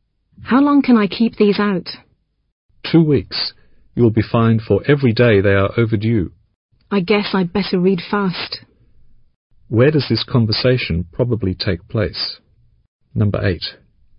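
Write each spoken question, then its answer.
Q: Where does this conversation probably take place?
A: In a library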